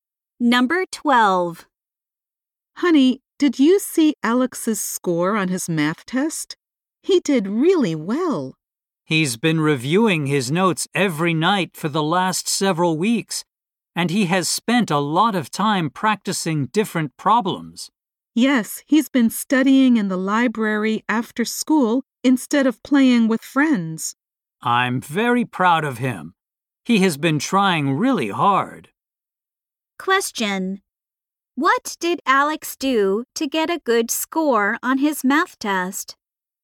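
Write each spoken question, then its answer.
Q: What did Alex do to get a good score on his math test?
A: He reviewed his notes every night and practiced problems.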